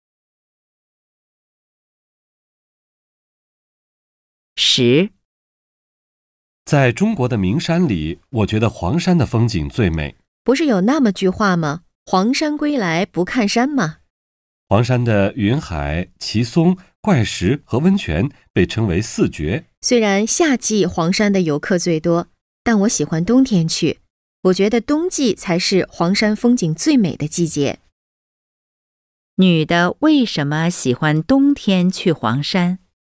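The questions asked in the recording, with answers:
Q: 女的为什么喜欢冬天去黄山?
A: 她觉得冬季是黄山风景最美的季节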